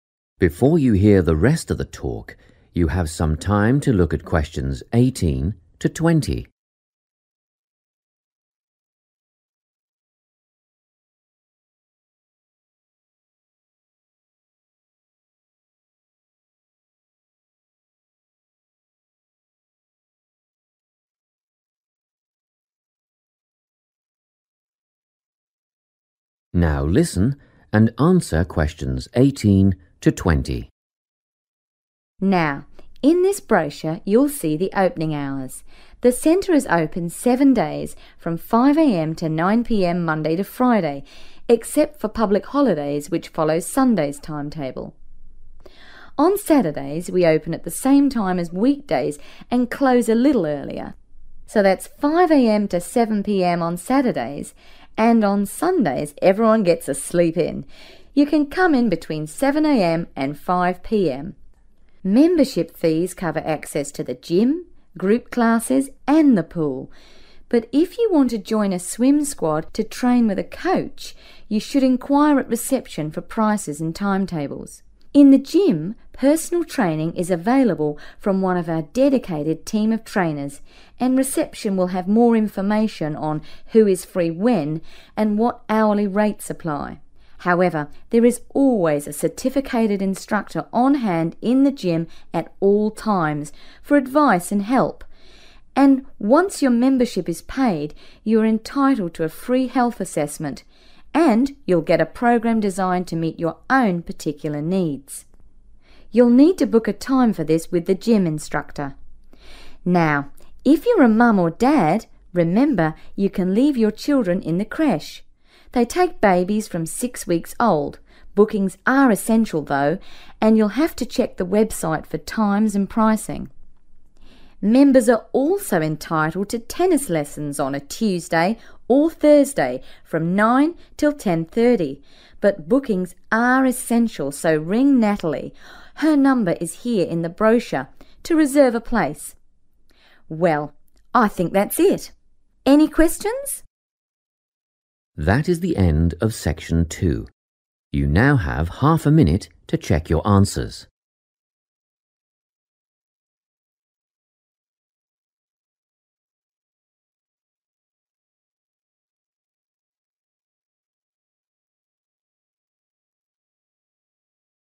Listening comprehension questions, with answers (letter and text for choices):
Choose the correct letter, A, B or C.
The sports centre is open on public holidays from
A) 7 a.m. to 5 p.m.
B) 5 a.m. to 7 p.m.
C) 5 a.m. to 9 p.m.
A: A) 7 a.m. to 5 p.m.

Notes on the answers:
Thứ 2-6: 5h–21h → không liên quan đến ngày lễ. Ngày lễ (public holidays): dùng giờ Chủ nhật, Chủ nhật: 7h–17h. Ngày lễ = giờ Chủ nhật → 7 a.m. to 5 p.m. ⇒ A là đáp án chính xác The centre is open seven days from 5 am to 9 pm, Monday to Friday, except for public holidays, which follow Sunday's timetable. On Sundays everyone gets a sleep in. You can come in between 7 am and 5 pm.